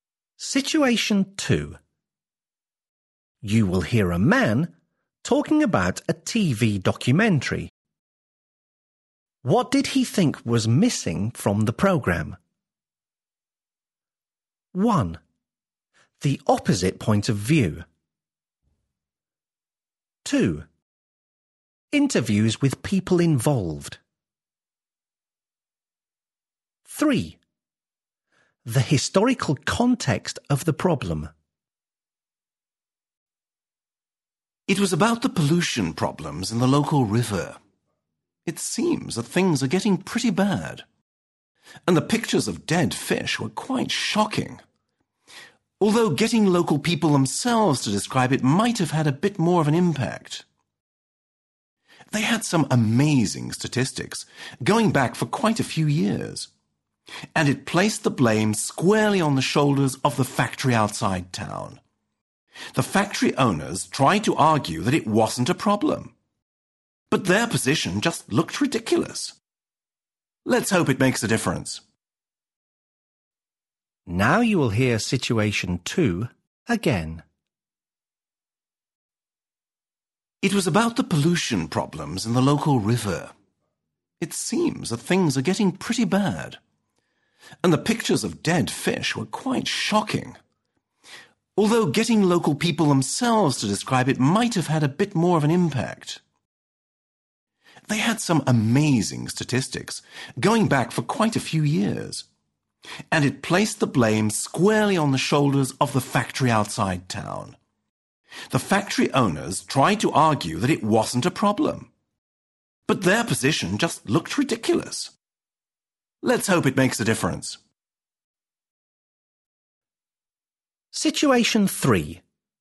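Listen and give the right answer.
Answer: 2: Interviews with people involved.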